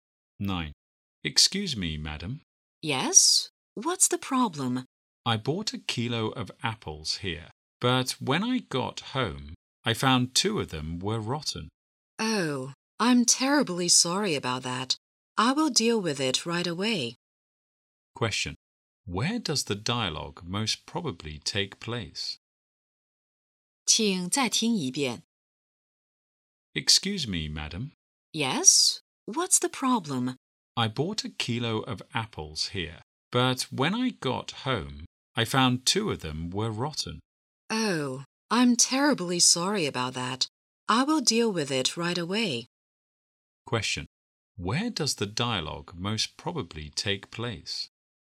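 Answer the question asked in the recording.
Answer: In a shop (fruit store)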